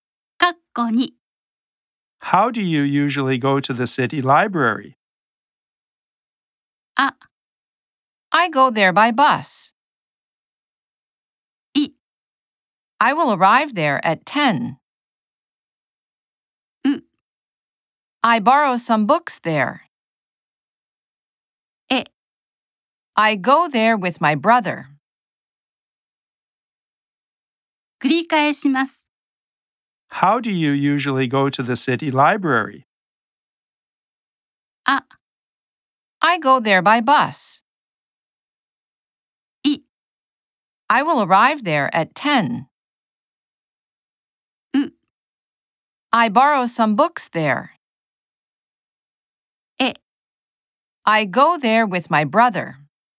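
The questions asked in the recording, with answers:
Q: How do you usually go to the city library?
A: A: I go there by bus.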